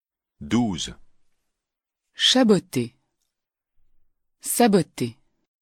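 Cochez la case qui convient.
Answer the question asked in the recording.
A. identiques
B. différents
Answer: B. différents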